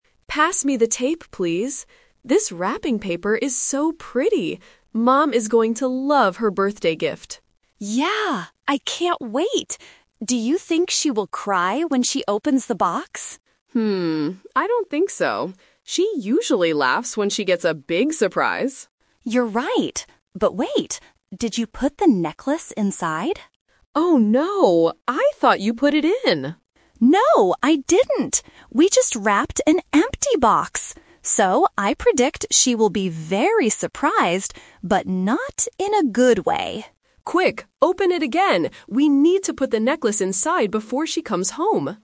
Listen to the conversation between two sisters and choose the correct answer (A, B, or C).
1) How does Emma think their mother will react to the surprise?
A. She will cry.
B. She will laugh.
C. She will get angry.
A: B. She will laugh.

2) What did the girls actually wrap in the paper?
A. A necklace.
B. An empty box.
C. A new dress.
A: B. An empty box.

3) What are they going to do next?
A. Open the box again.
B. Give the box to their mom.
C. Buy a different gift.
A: A. Open the box again.

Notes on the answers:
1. Emma says, "She usually laughs when she gets a big surprise."
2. Lily realizes the mistake and says, "We just wrapped an empty box!"
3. At the end, Emma says, "Quick, open it again!" so they can put the necklace inside.

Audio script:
Emma: Pass me the tape, please. This wrapping paper is so pretty. Mom is going to love her birthday gift!
Lily: Yeah! I can't wait. Do you think she will cry when she opens the box?
Emma: Hmm, I don't think so. She usually laughs when she gets a big surprise.
Lily: You're right. But wait... did you put the necklace inside?
Emma: Oh no! I thought you put it in.
Lily: No, I didn't! We just wrapped an empty box! So, I predict she will be very surprised, but not in a good way!

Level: A2

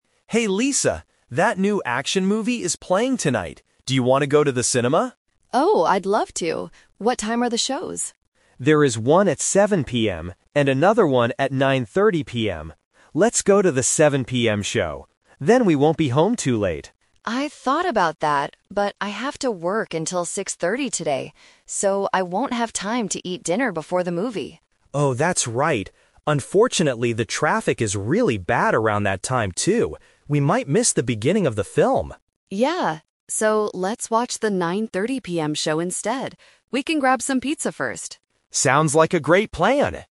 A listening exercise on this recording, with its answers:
Listen to the conversation and choose the correct answer (A, B, or C).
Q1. What time will they watch the movie?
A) 6:30 PM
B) 7:00 PM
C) 9:30 PM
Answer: C) 9:30 PM

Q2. Why can't Lisa go to the early show?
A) She has to work late.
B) She doesn't like action movies.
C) She has to do her homework.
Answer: A) She has to work late.

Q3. What will Mark and Lisa do before the movie?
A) They will buy the tickets.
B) They will eat some pizza.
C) They will wait in the traffic.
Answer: B) They will eat some pizza.

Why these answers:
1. They finally decide to watch the 9:30 PM show. Option (B) is a trap because Mark suggests 7:00 PM first, but Lisa says she doesn't have time. Option (A) is a trap because 6:30 PM is the time Lisa finishes work, not the movie time.
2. Lisa says, "I have to work until 6:30 today," which means she won't have time to eat and get to the 7:00 PM movie. Option (B) is a trap because she actually wants to go ("I'd love to"). Option (C) is not mentioned in the audio.
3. Lisa says, "We can grab some pizza first," before the 9:30 PM show. Option (C) is a trap because traffic is mentioned as a problem for the 7:00 PM show, not an activity they plan to do. Option (A) is plausible but not mentioned in the conversation.

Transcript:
Mark: Hey Lisa, that new action movie is playing tonight. Do you want to go to the cinema?
Lisa: Oh, I'd love to! What time are the shows?
Mark: There is one at 7:00 PM and another one at 9:30 PM. Then we won't be home too late.
Lisa: I thought about that, but I have to work until 6:30 today. So, I won't have time to eat dinner before the movie.
Mark: Oh, that's right. Unfortunately, the traffic is really bad around that time, too. We might miss the beginning of the film.
Lisa: Yeah. So, let's watch the 9:30 PM show instead. We can grab some pizza first.
Mark: Sounds like a great plan!

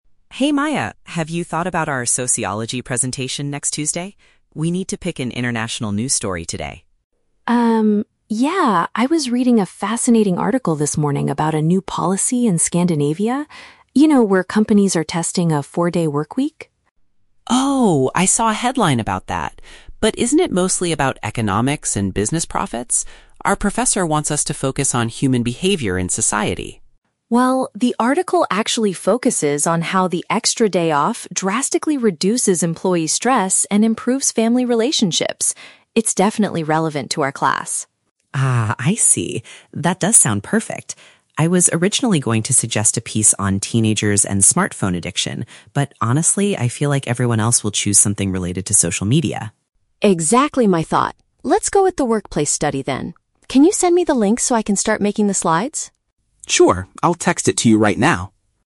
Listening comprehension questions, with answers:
Listen to a conversation between two university students. Choose the correct answer (A, B, or C) for each question.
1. What is Maya's main reason for suggesting the article about the Scandinavian policy?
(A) It explains how companies can make more money.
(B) It highlights the positive effects on mental health and home life.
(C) It describes the political history of a European country.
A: (B) It highlights the positive effects on mental health and home life.

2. Why does Leo decide NOT to use his own initial idea?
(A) He thinks the topic of smartphones is too complicated to research.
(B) He lost the website address for the news story he wanted to use.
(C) He believes other classmates will probably talk about similar technology issues.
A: (C) He believes other classmates will probably talk about similar technology issues.

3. What will Leo do immediately after the conversation?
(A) Begin designing the presentation slides.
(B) Message the article's web address to his partner.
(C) Ask their professor for permission to use the topic.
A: (B) Message the article's web address to his partner.

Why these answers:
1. Maya says the article focuses on how the policy "reduces employee stress and improves family relationships". Option B paraphrases this perfectly (mental health = reduce stress; home life = family relationships). Option A is the Trap: Leo mentions "economics and business profits", but Maya corrects him, saying that's not the main focus. Option C is plausible for an international news story but is not mentioned.
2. Leo states that he feels "everyone else will choose something related to social media". Option C uses synonyms to express this exact concern. Option A is not mentioned. Option B is the Trap: The word "link" (website address) is mentioned at the very end of the audio, but it is for Maya's article, not because Leo lost anything.
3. Maya asks Leo to send her the link, and he replies, "I'll text it to you right now." Option B paraphrases this action (text = message; link = web address). Option A is the Trap: Maya is the one who will "start making the slides" (design the presentation), not Leo. Option C is a logical step in a university setting, but it is not mentioned in the dialogue.

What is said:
Leo: Hey Maya, have you thought about our Sociology presentation next Tuesday? We need to pick an international news story today.
I was reading a fascinating article this morning about a new policy in Scandinavia. You know, where companies are testing a four-day workweek?
Leo: Oh, I saw a headline about that! But isn't it mostly about economics and business profits? Our professor wants us to focus on human behavior and society.
Maya: Well, the article actually focuses on how the extra day off drastically reduces employee stress and improves family relationships. It's definitely relevant to our class.
Leo: Ah, I see. That does sound perfect. I was originally going to suggest a piece on teenagers and smartphone addiction, but honestly, I feel like everyone else will choose something related to social media.
Maya: Exactly my thought. Let's go with the workplace study then.

